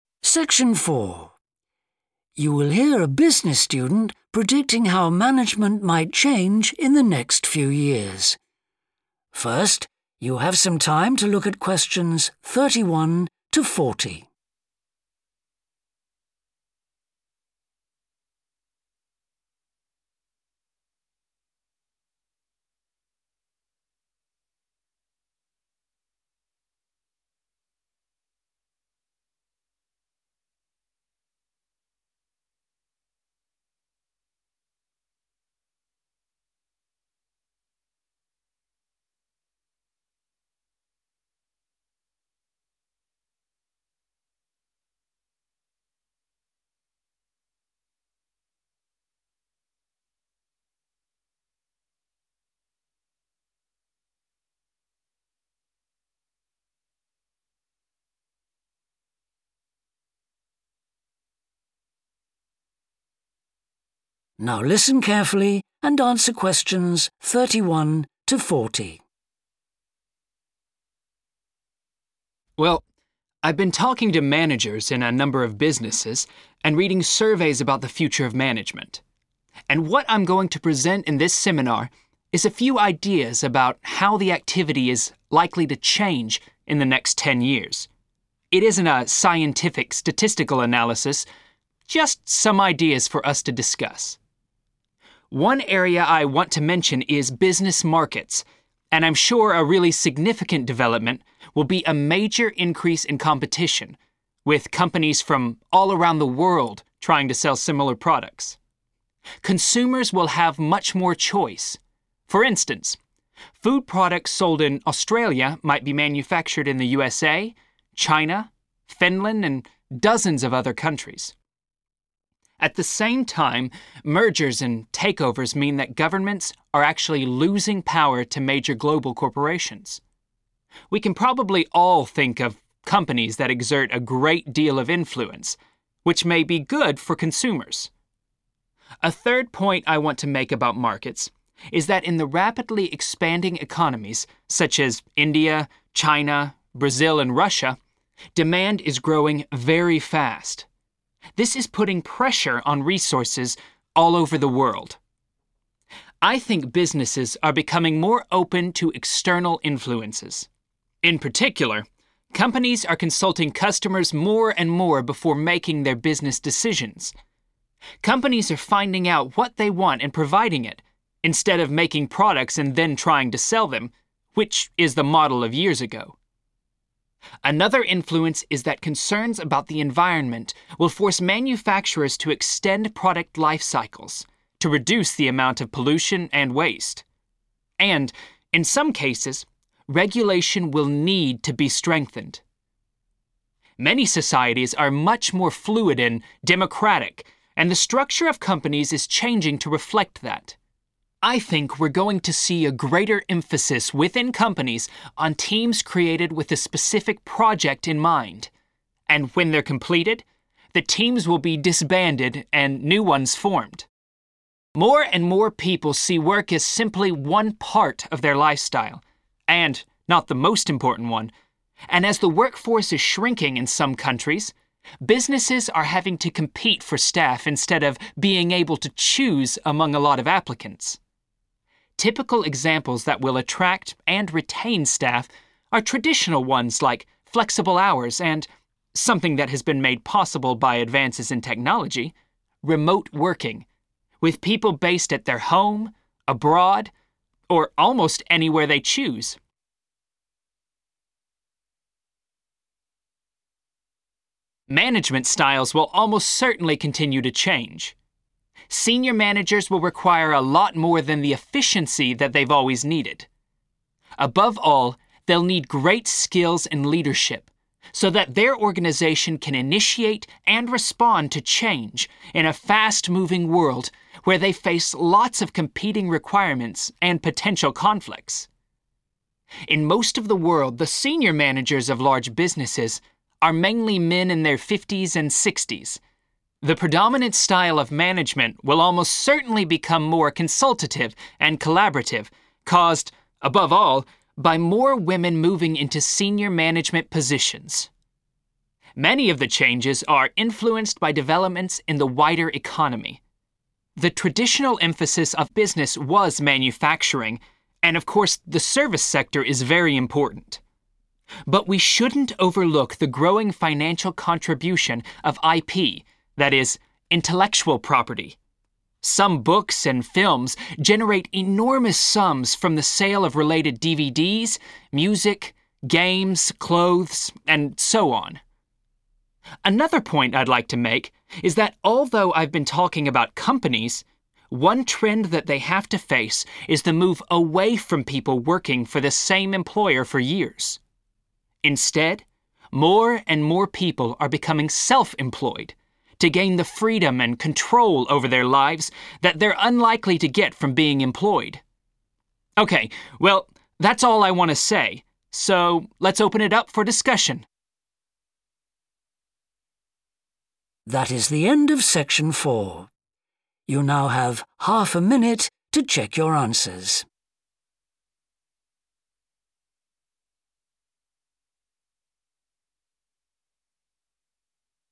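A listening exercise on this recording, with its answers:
Complete the notes below. Write ONE WORD ONLY.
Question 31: greater (31) among companies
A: competition

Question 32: increase in power of large (32) companies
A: global

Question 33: rising (33) in certain countries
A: demand

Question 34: more discussion with (34) before making business decisions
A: customers

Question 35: environmental concerns which may lead to more (35)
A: regulation

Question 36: more teams will be formed to work on a particular (36)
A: project

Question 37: businesses may need to offer hours that are (37) , or the chance to work remotely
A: flexible

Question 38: increasing need for managers to provide good (38)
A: leadership

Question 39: changes influenced by (39) taking senior roles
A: women

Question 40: more and more (40) workers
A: self-employed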